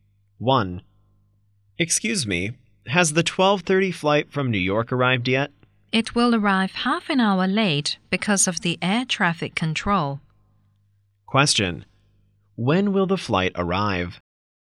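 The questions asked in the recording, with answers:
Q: When will the flight arrive?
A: At 1:00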